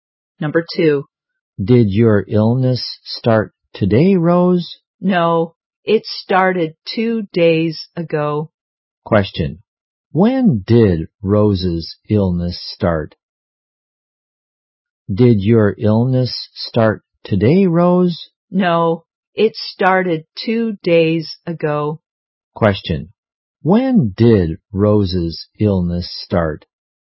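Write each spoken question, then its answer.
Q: when did Rose's illness start?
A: 2 days ago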